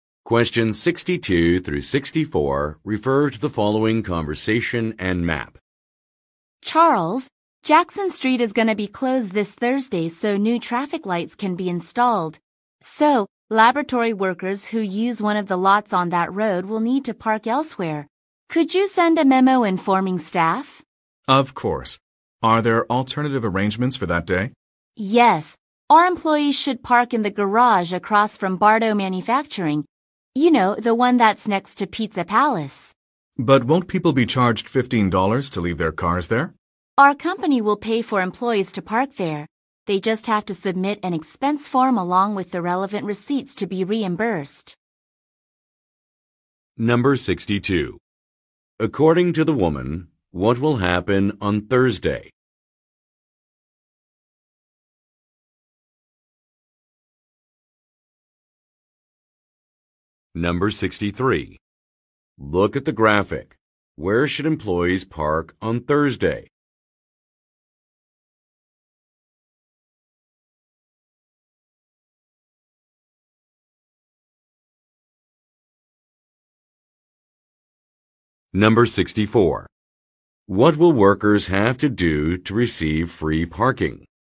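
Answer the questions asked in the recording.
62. Jackson Street will be closed so new traffic lights can be installed
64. Submit an expense form with the receipts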